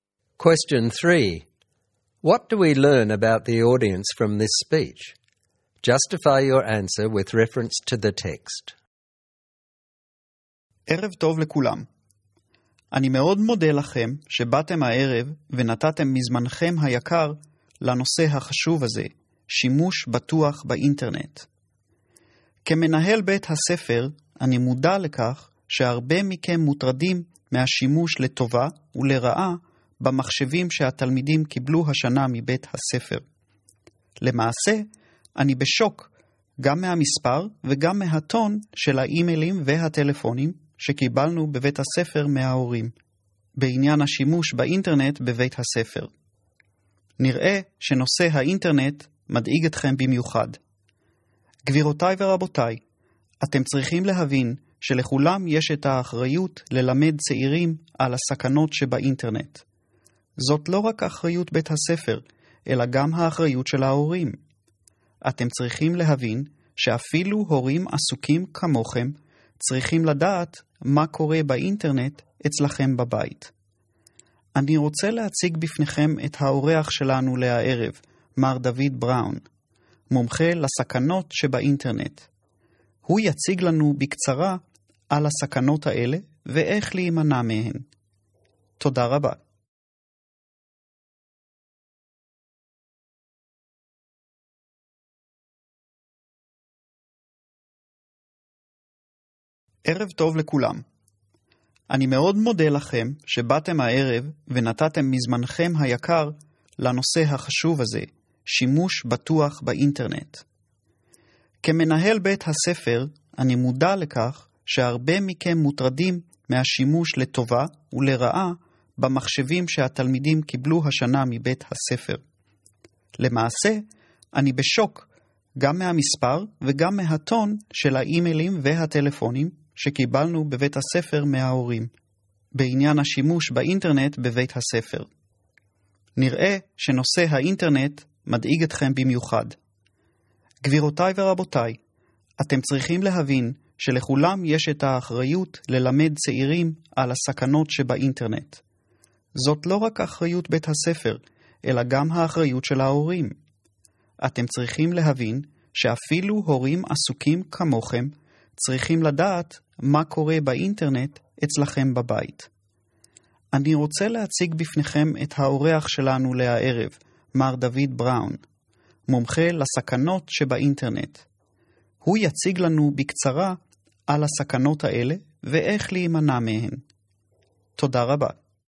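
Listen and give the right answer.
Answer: They are busy parents of students at the school. They are worried about internet use on the school-issued computers, and many sent emails and made phone calls, some in a harsh tone. The principal reminds them that they share the responsibility.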